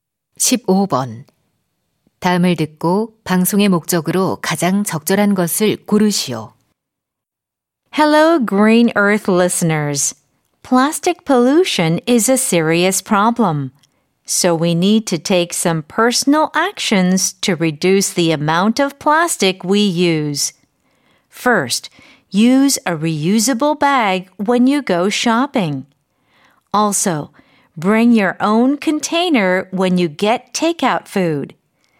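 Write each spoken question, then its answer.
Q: 다음을 듣고 방송의 목적으로 가장 적절한 것을 고르시오.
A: 플라스틱 사용 줄이기 실천을 독려하려고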